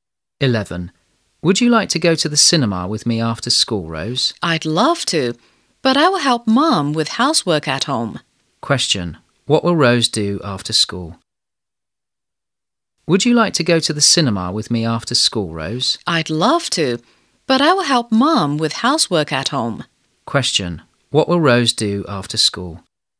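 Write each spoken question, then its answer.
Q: What will Rose do after school?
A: Help her mom with housework at home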